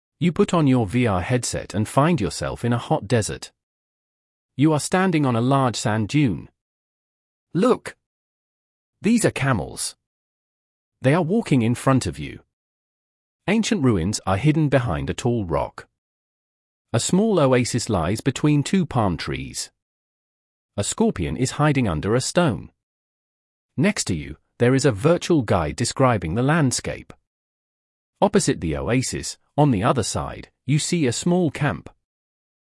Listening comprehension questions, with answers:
Listen to the text and fill in the gaps with the prepositions of places.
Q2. You are standing поле ответа 2 a large sand dune.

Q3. Camels are walking поле ответа 3 you.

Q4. Ancient ruins are hidden поле ответа 4 a tall rock.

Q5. A small oasis lies поле ответа 5 two palm trees.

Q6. A scorpion is hiding поле ответа 6 a stone.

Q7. поле ответа 7 you, there is a virtual guide describing the landscape.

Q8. поле ответа 8 the oasis, on the other side, you see a small camp.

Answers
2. on
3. in front of
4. behind
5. between
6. under
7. next to
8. opposite

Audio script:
You put on your VR headset and find yourself in a hot desert. You are standing on a large sand dune. Look! These are camels! They are walking in front of you. Ancient ruins are hidden behind a tall rock. A small oasis lies between two palm trees. A scorpion is hiding under a stone. Next to you, there is a virtual guide describing the landscape. Opposite the oasis, on the other side, you see a small camp.

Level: 11 класс